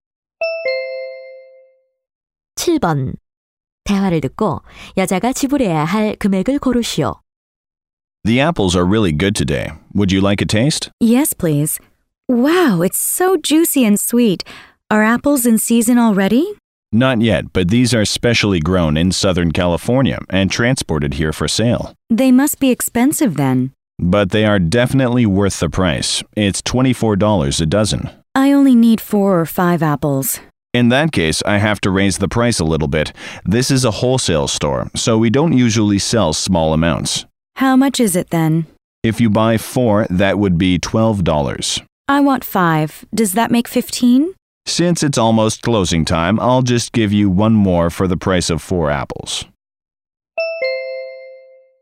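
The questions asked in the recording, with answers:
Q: 대화를 듣고 여자가 지불해야 할 금액을 고르시오.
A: 12달러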